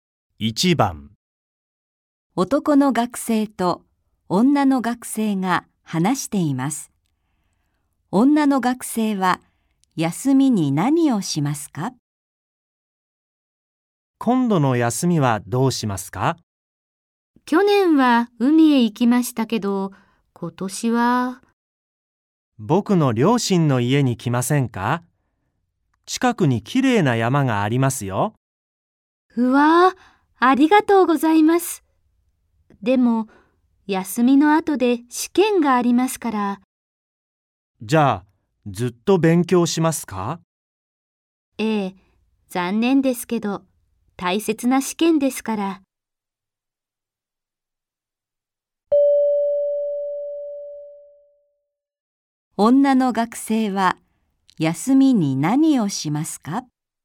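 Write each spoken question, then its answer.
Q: 女の学生は、休みに何をしますか?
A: 試験の勉強をする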